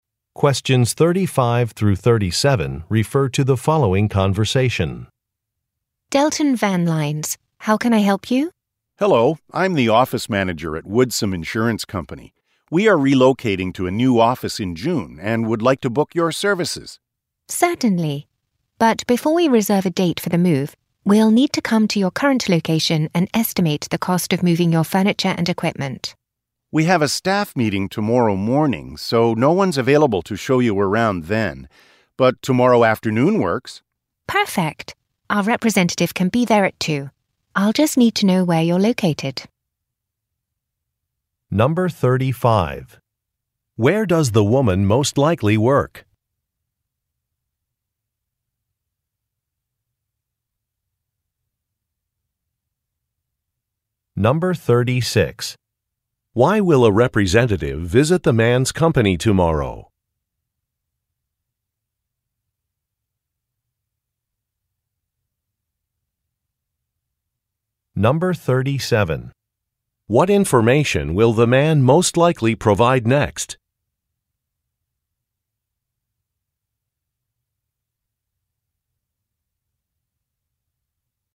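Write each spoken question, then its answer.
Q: Where does the woman most likely work?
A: At a moving company (Delton Van Lines)

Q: Why will a representative visit the man's company tomorrow?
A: To estimate the cost of moving furniture and equipment

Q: What information will the man most likely provide next?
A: The company's location (address)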